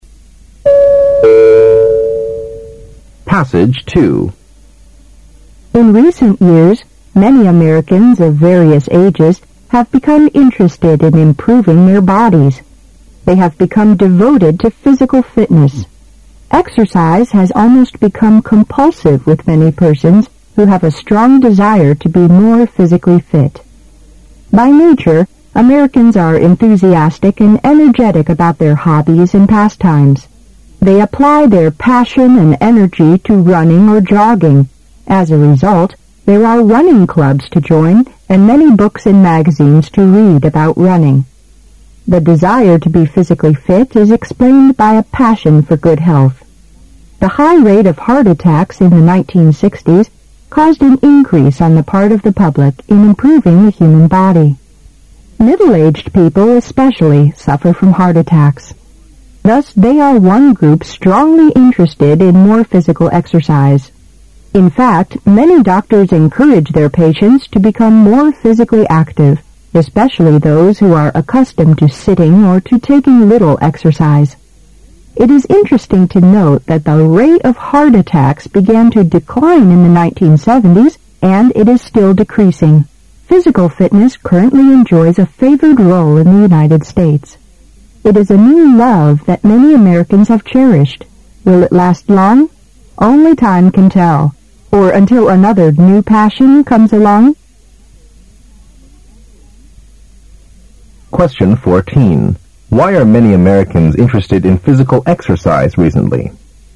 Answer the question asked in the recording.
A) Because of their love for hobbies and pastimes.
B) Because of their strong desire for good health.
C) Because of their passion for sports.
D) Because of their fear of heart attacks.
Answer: B) Because of their strong desire for good health.

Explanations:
观点态度题。男士说他在那个大型商业机械公司工作了几个月,但是他感觉会计不是他想做的工作。由此可知,他不喜欢在这个公司做会计工作。

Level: 大学四级